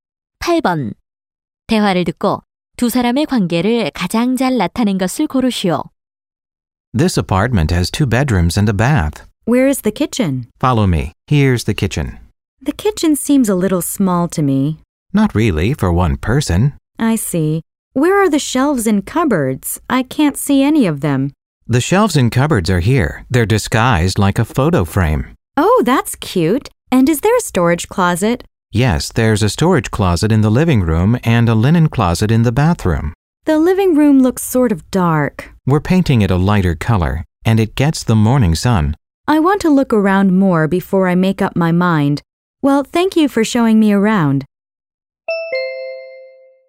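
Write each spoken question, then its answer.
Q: 대화를 듣고 두 사람의 관계를 가장 잘 나타낸 것을 고르시오.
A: 부동산 중개인과 고객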